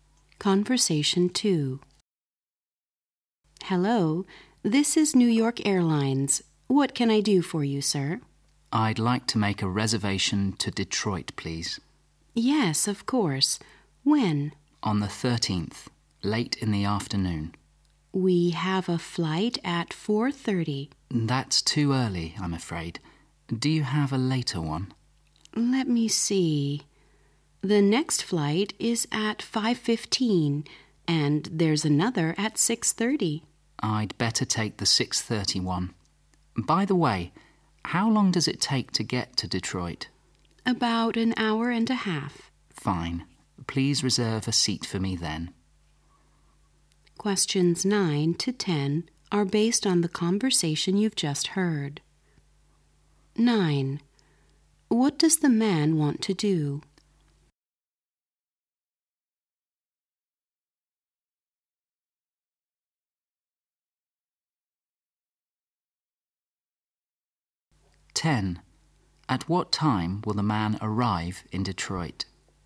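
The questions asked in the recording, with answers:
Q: What does the man want to do?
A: Reserve a flight to Detroit

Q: At what time will the man arrive in Detroit?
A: About 8:00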